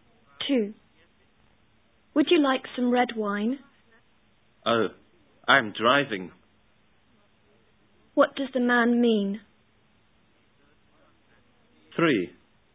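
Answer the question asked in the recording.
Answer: He can't drink wine because he is driving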